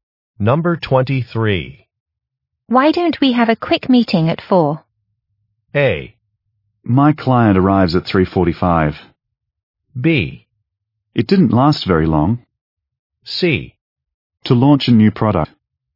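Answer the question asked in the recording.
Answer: A: My client arrives at 3:45.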